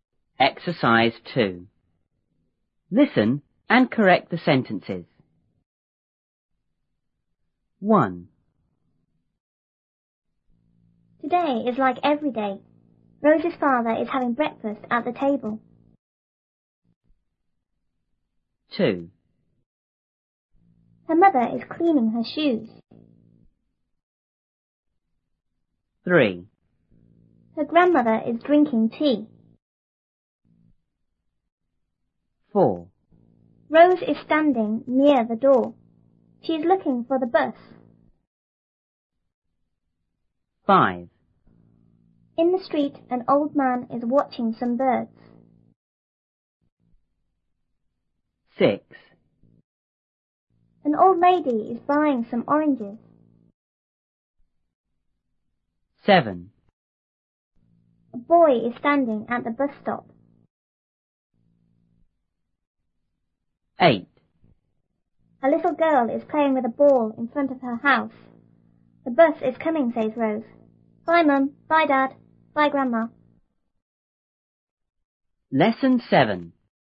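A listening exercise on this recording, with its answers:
2.Listen and correct the sentences.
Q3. Rose is drinking tea.____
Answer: Her grandmother is drinking tea.

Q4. Her grandmother is looking for the bus.___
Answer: Rose is looking for the bus.

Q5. An old lady is watching some birds.____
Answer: An old man is watching some birds.

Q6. An old man is buying some oranges.____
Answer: An old lady is buying some oranges.

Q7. A little girl is standing at the bus-stop._____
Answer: A boy is standing at the bus stop.

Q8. A boy is playing with a ball.___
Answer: A little girl is playing with a ball.

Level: 初中英语广州版1B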